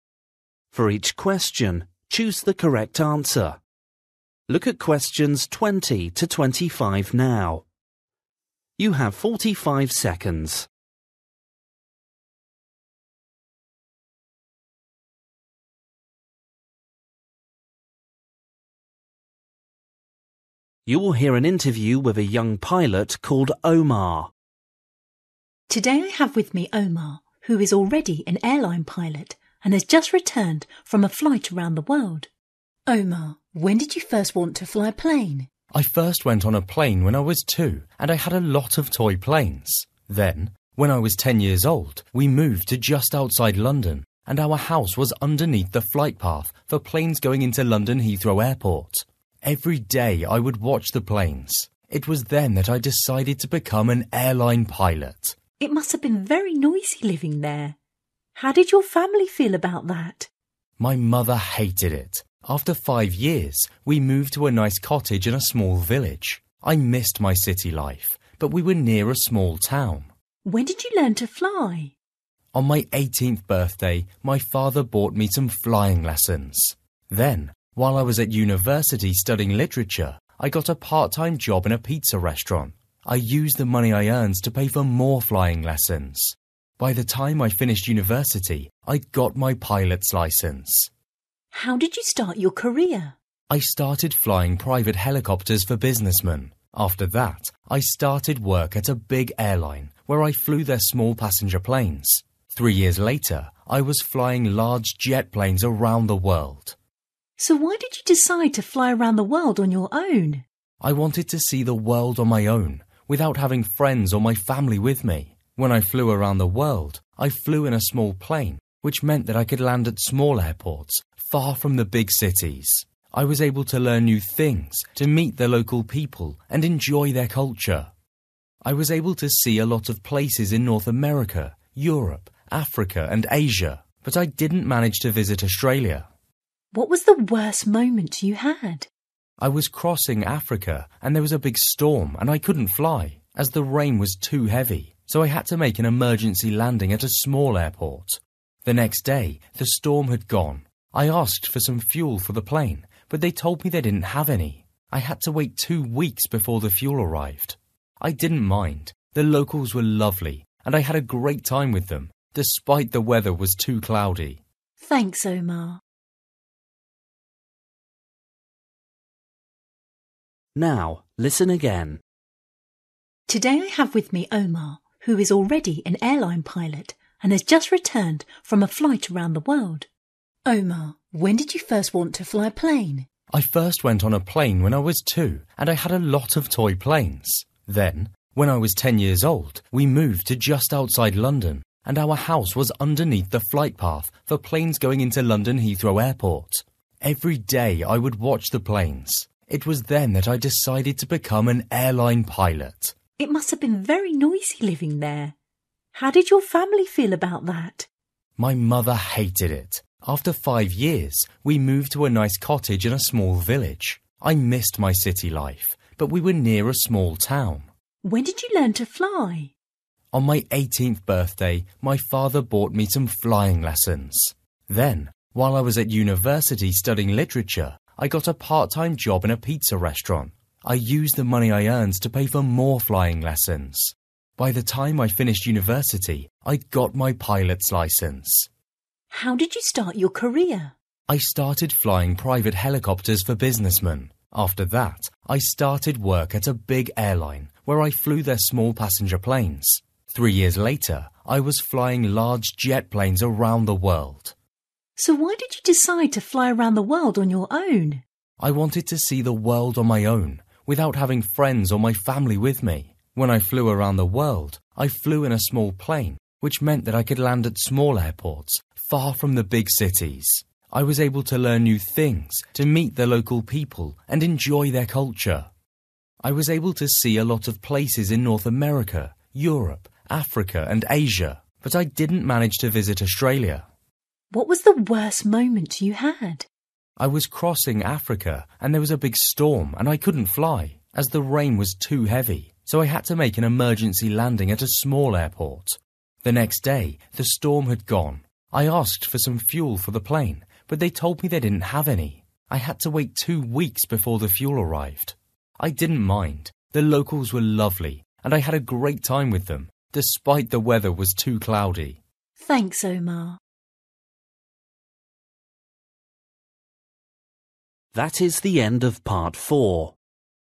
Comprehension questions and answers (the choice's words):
For each question, choose the correct answer.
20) Omar first became interested in flying planes when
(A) he first went on an aeroplane.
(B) he moved to a house near an airport.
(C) he played with his toy aeroplanes.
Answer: he moved to a house near an airport.

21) Where did Omar's family move to after living next to the airport?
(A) to a town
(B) to a city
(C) to a village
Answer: to a village

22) How did Omar learn to fly?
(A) His father taught him.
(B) He took flying lessons.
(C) He took a university course.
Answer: He took flying lessons.

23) Omar started his career as a pilot flying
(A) a helicopter.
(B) a small plane.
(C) a large jet.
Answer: a helicopter.

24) Omar wanted to fly around the world on his own because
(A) he didn't have any friends.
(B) he wanted to meet new people.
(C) there wasn't enough space in the plane.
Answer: he wanted to meet new people.

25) Why did Omar have to make an emergency landing?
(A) It was raining a lot.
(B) He didn't have any more fuel.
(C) It was very cloudy.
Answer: It was raining a lot.

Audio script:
Woman: Today I have with me Omar who is already an airline pilot and has just returned from a flight around the world. Omar, when did you first want to fly a plane?
Omar: I first went on a plane when I was two and I had a lot of toy planes. (20) Then, when I was ten years old, we moved to just outside London and our house was underneath the flight path for planes going into London Heathrow airport. Every day I would watch the planes. It was then that I decided to become an airline pilot.
Woman: It must have been very noisy living there. How did your family feel about that?
Omar: My mother hated it. (21) After five years, we moved to a nice cottage in a small village. I missed my city life, but we were near a small town.
Woman: When did you learn to fly?
Omar: (22) On my eighteenth birthday, my father bought me some flying lessons. Then while I was at university studying literature I got a part-time job in a pizza restaurant. I used the money I earned to pay for more flying lessons. By the time I finished university I'd got my pilot's licence.
Woman: How did you start your career?
Omar: (23) I started flying private helicopters for businessmen. After that I started work at a big airline where I flew their small passenger planes. Three years later I was flying large jet planes around the world.
Woman: So why did you decide to fly around the world on your own?
Omar: (24) I wanted to see the world on my own, without having friends or my family with me. When I flew around the world, I flew in a small plane which meant that I could land at small airports far from the big cities. (24) I was able to learn new things, to meet the local people and enjoy their culture. I was able to see a lot of places in North America, Europe, Africa and Asia but I didn't manage to visit Australia.
Woman: What was the worst moment you had?
Omar: (25) I was crossing Africa and there was a big storm and I couldn't fly, as the rain was too heavy, so I had to make an emergency landing at a small airport. The next day the storm had gone. I asked for some fuel for the plane, but they told me they didn't have any. I had to wait two weeks before the fuel arrived. I didn't mind, the locals were lovely, and I had a great time with them despite the weather was too cloudy.
Woman: Thanks Omar.

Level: PET (B1)